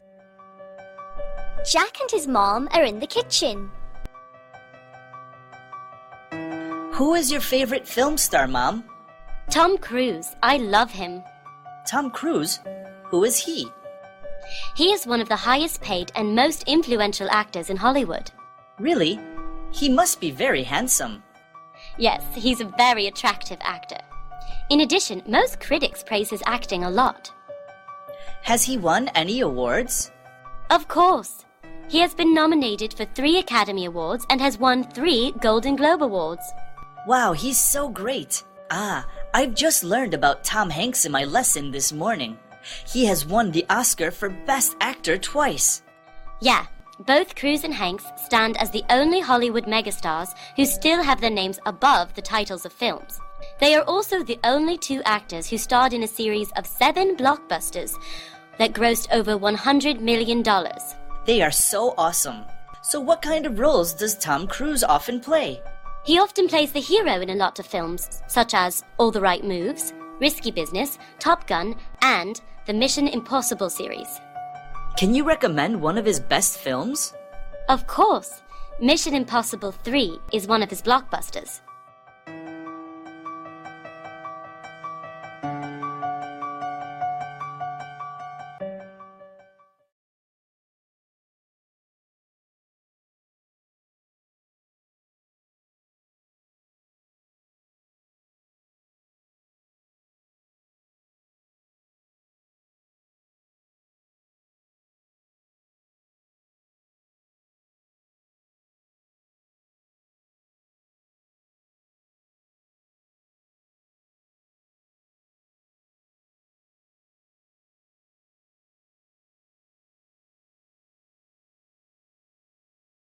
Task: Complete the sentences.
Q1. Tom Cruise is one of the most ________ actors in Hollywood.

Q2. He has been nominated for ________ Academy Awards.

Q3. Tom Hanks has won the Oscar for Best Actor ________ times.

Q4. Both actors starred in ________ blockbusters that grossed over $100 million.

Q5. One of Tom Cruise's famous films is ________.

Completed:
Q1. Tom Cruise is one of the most influential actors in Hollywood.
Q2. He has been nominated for three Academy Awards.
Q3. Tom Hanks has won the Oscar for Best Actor two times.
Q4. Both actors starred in seven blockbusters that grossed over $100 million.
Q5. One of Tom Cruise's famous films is Mission Impossible 3.

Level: lớp 7